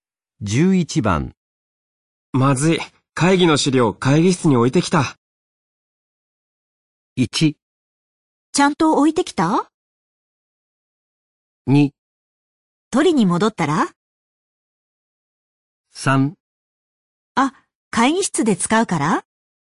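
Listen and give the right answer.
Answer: 2: 取りに戻ったら?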